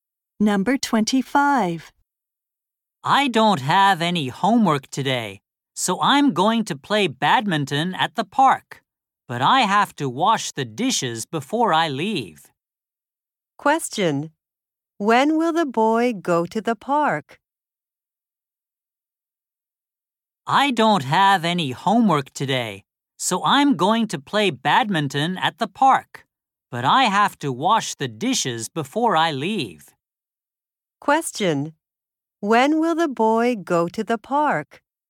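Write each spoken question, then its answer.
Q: When will the boy go to the park?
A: After he washes the dishes.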